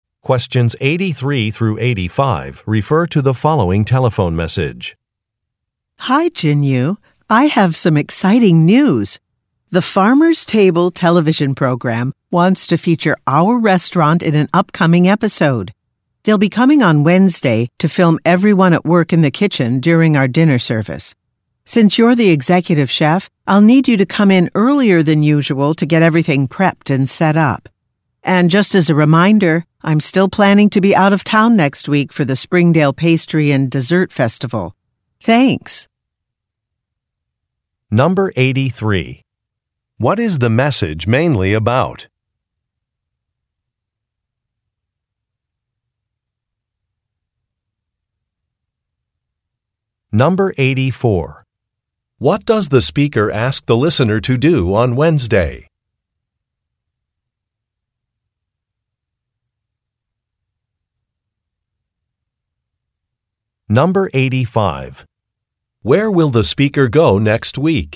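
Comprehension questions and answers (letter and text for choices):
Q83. What is the message mainly about?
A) Revising a restaurant menu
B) Filming for a television show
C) Launching an advertising campaign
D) Renovating a kitchen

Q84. What does the speaker ask the listener to do on Wednesday?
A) Come to work early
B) Experiment with new ingredients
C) Train an employee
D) Prepare for a safety inspection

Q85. Where will the speaker go next week?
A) To a food festival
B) To a cooking class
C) To a farmers market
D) To a bakery opening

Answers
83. B) Filming for a television show
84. A) Come to work early
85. A) To a food festival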